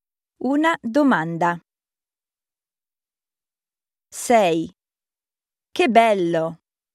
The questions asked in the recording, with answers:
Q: Che bello!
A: Un'esclamazione.